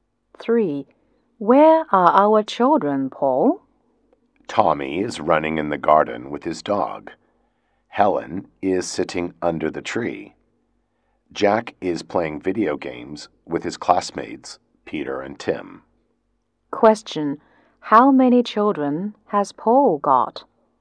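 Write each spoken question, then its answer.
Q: How many children has Paul got?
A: Three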